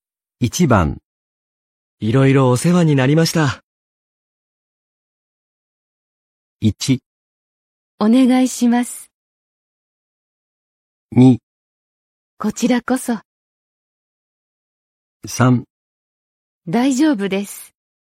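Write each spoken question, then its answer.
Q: いろいろお世話になりました。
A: 2: こちらこそ。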